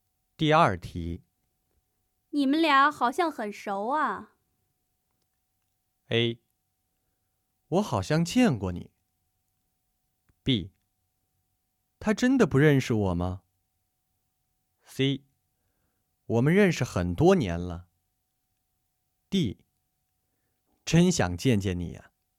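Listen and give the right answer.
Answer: C: 我们认识很多年了。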